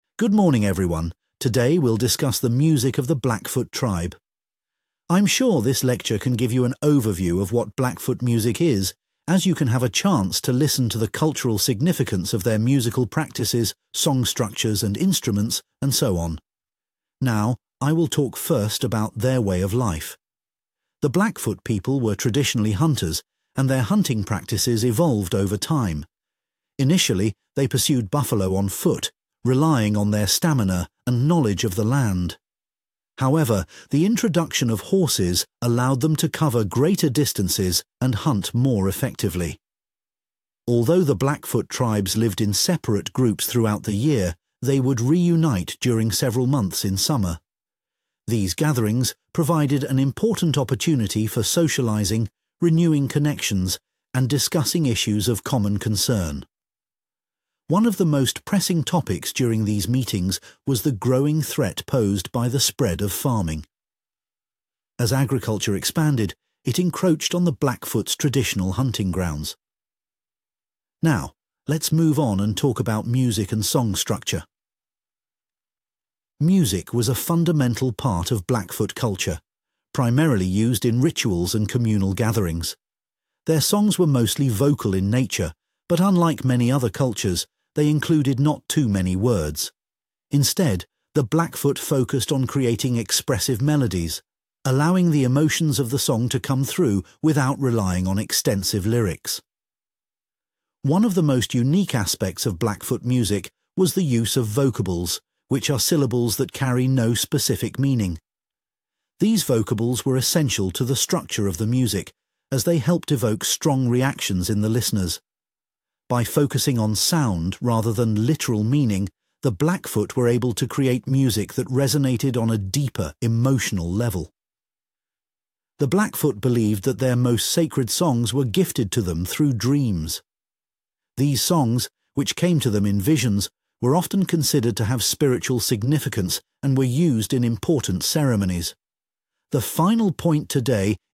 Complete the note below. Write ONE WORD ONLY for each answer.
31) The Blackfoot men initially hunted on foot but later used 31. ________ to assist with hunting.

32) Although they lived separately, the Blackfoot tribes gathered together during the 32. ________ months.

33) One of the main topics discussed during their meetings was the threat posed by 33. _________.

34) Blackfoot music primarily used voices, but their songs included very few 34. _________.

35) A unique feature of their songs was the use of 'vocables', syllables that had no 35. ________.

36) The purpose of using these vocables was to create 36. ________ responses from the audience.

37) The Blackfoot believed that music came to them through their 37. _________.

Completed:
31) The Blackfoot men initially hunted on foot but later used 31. horses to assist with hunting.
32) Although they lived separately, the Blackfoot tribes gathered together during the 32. summer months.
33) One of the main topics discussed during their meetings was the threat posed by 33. farming.
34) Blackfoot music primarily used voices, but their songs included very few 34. words.
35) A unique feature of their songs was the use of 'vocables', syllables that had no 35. meaning.
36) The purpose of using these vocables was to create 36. emotional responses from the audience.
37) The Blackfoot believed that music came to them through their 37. dreams.